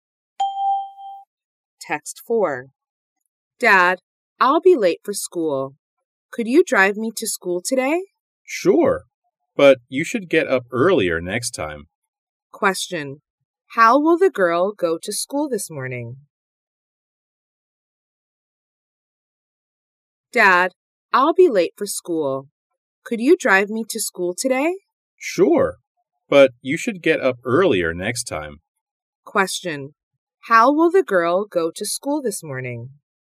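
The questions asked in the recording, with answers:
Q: How will the girl go to school this morning?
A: By car; her dad will drive her.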